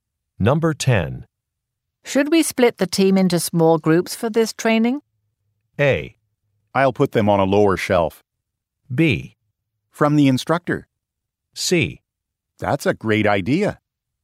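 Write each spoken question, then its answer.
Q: Should we split the team into small groups for this training?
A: C: That's a great idea.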